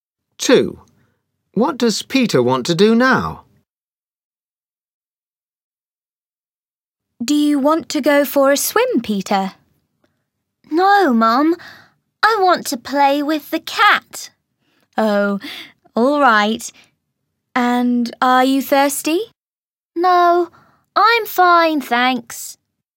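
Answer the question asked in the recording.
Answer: Play with the cat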